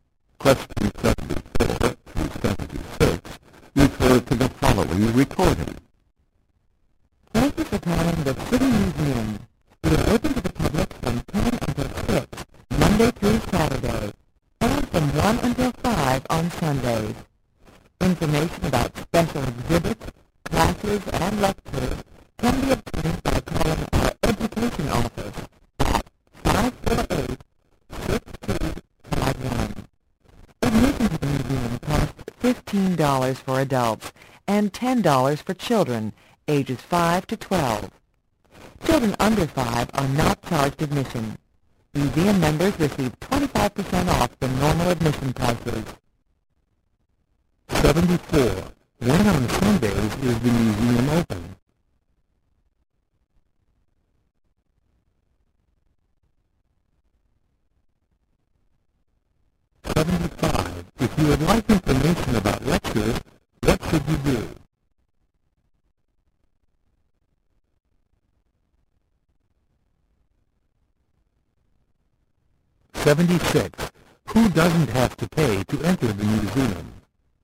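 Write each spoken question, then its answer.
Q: When on Sundays is the museum open?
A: From 1 until 5

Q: If you would like information about lectures, what should you do?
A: Call the education office

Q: Who doesn't have to pay to enter the museum?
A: Children under 5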